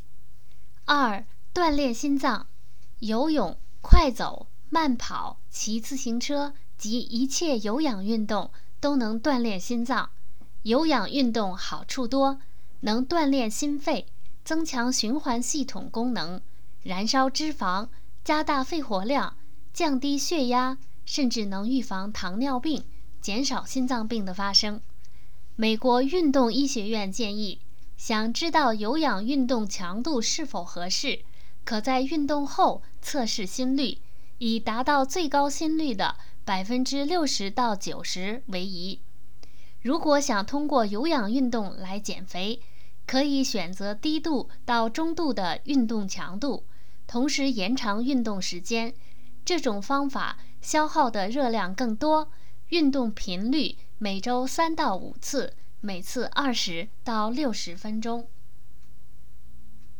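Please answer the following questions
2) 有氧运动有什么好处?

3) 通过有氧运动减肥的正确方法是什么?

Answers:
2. 能锻炼心肺,增强循环系统功能,燃烧脂肪,加大肺活量,降低血压,预防糖尿病,减少心脏病的发生
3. 选择低度到中度的运动强度,同时延长运动时间;每周3-5次,每次20-60分钟

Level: 3rd Year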